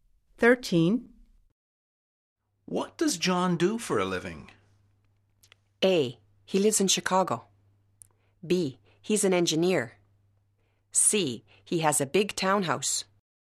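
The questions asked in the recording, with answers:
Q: What does John do for a living?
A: B: He's an engineer.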